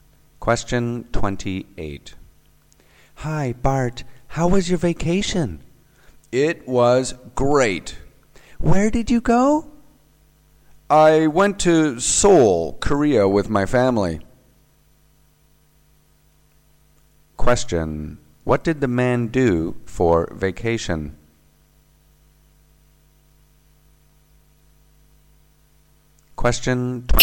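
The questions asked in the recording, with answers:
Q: What did the man do for vacation?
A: He went to Seoul, Korea with his family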